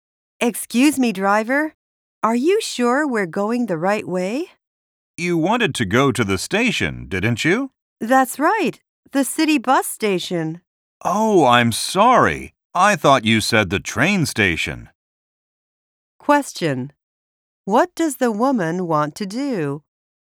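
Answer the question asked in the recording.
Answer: Go to the city bus station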